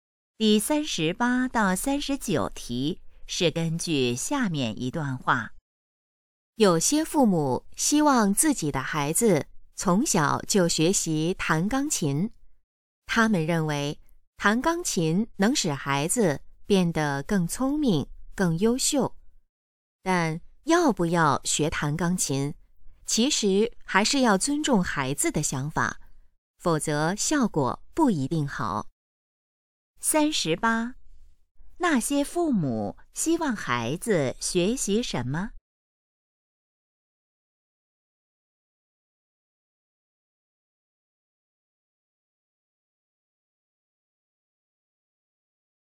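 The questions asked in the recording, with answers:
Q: 那些父母希望孩子学习什么?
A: 弹钢琴

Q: 这段话主要想告诉我们什么?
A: 要尊重孩子的想法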